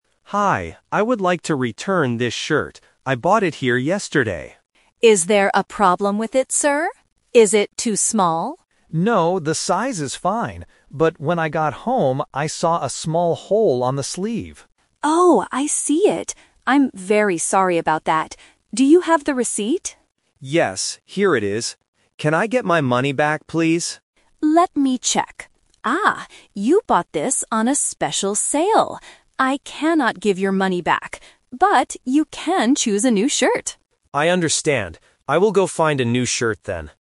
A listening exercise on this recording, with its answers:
Listen to the conversation and choose the correct answer (A, B, or C) for each question.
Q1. Why does the customer want to return the shirt?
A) Because it is too small.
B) Because it has a small hole.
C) Because he doesn't like the color.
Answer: Because it has a small hole.

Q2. What does the customer give to the staff?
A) A credit card.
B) A membership card.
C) The receipt.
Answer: The receipt.

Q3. What will the customer do next?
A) Get his money back.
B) Choose a new shirt.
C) Go to another store.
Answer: Choose a new shirt.

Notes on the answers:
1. The customer explains the problem: "when I got home, I saw a small hole on the sleeve."
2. The staff asks, "Do you have the receipt?" and the customer answers, "Yes, here it is."
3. This is "The Twist". The customer asks for his money back, but the staff says no because it was on sale. The staff offers, "you can choose a new shirt," and the customer agrees to go find one.

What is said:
Customer: Hi, I would like to return this shirt. I bought it here yesterday.
Staff: Is there a problem with it, sir? Is it too small?
Customer: No, the size is fine. But when I got home, I saw a small hole on the sleeve.
Staff: Oh, I see it. I'm very sorry about that. Do you have the receipt?
Customer: Yes, here it is. Can I get my money back, please?
Staff: Let me check. Ah, you bought this on a special sale. I cannot give your money back. But you can choose a new shirt.

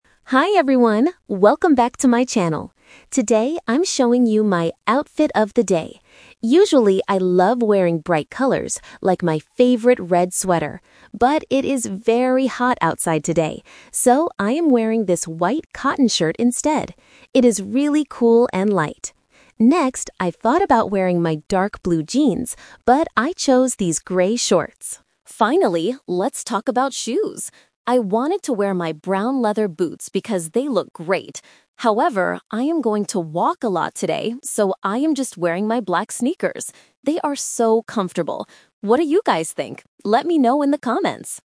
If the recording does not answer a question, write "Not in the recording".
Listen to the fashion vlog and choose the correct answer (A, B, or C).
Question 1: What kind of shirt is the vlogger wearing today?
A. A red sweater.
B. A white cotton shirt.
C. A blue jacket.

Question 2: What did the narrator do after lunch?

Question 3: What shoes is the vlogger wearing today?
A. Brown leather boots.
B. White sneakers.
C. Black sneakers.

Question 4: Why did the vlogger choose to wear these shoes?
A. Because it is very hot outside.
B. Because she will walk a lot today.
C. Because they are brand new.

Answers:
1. A white cotton shirt.
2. Not in the recording
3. Black sneakers.
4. Because she will walk a lot today.

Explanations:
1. The vlogger clearly states, "So, I am wearing this white cotton shirt instead." The Trap: Option (A) is a trap. The vlogger mentions a "red sweater", but that is what she usually loves wearing, not what she is wearing today. Option (C) is not mentioned.
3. Option (A) is the trap because she wanted to wear the brown leather boots, but changed her mind. Option (B) mixes the color "white" (from the shirt) to confuse the listener.
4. She explains her shoe choice by saying, "I am going to walk a lot today, so I am just wearing my black sneakers." The Trap: Option (A) is a trap because "it is very hot outside" is the reason she chose the white shirt, not the shoes. Option (C) is a plausible reason for a fashion vlog but is never mentioned in the audio.

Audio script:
Vlogger: Hi everyone, welcome back to my channel! Today, I'm showing you my "Outfit of the Day". Usually, I love wearing bright colors, like my favorite red sweater. But it is very hot outside today! So, I am wearing this white cotton shirt instead. It is really cool and light. Next, I thought about wearing my dark blue jeans, but I chose these grey shorts. Finally, let's talk about shoes. I wanted to wear my brown leather boots because they look great. However, I am going to walk a lot today, so I am just wearing my black sneakers. They are so comfortable! What do you guys think? Let me know in the comments!

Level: A2

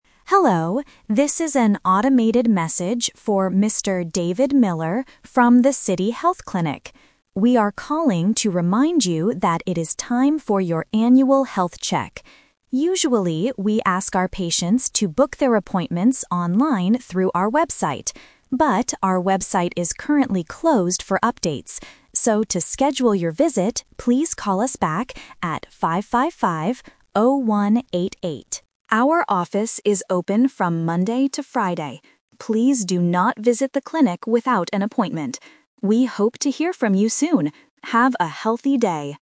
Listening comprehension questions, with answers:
Listen to the voicemail and choose the correct answer (A, B, or C).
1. Why is the clinic calling Mr. Miller?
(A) To give him his blood test results.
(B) To remind him about his annual health check.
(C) To tell him about a new doctor.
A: To remind him about his annual health check.

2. Why can't Mr. Miller book his appointment online?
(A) Because the clinic's website is closed for updates.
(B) Because he does not have an internet connection.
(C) Because the clinic does not have a website.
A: Because the clinic's website is closed for updates.

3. What does the clinic want Mr. Miller to do next?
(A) Visit the clinic today.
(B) Call them on the phone.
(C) Send them an email.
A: Call them on the phone.

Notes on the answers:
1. The automated voice clearly states, "We are calling to remind you that it is time for your annual health check." Option A and Option C are plausible reasons for a clinic to call, but they are not mentioned in the audio.
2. The voice says, "our website is currently closed for updates." Option B is not mentioned. Option C is the Trap; the clinic does have a website (they "usually" use it), but it is just not working right now.
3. This is The Twist. Because the website is closed, the clinic gives a new instruction: "So... please call us back at 555-0188." Option A is the Trap (the message specifically warns: "Please do not visit the clinic without an appointment"). Option C is not mentioned.

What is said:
Automated Voice: Hello, this is an automated message for Mr. David Miller from the City Health Clinic. We are calling to remind you that it is time for your annual health check. Usually, we ask our patients to book their appointments online through our website. But, our website is currently closed for updates. So, to schedule your visit, please call us back at 555-0188. Our office is open from Monday to Friday. Please do not visit the clinic without an appointment. We hope to hear from you soon. Have a healthy day!

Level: A2

